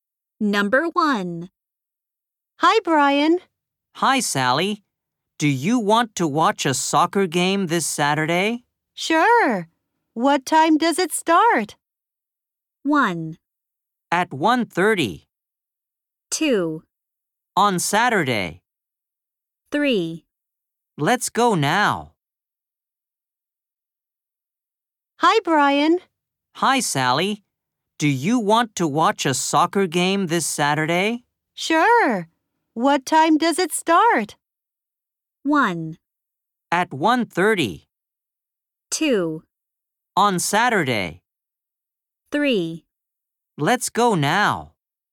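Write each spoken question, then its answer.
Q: Sure. What time does it start?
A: 1: At 1:30.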